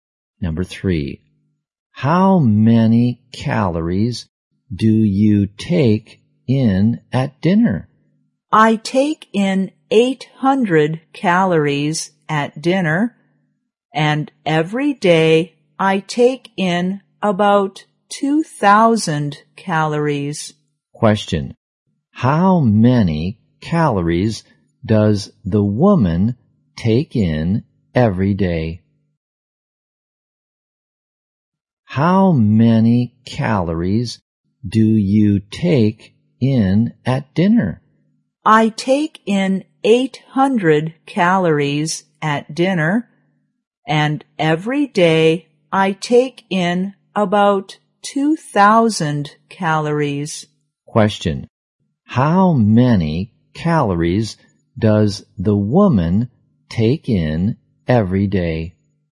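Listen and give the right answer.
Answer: About 2,000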